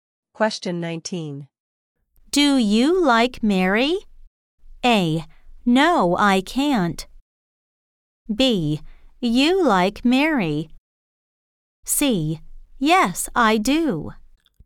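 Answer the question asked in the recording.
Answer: C: Yes, I do.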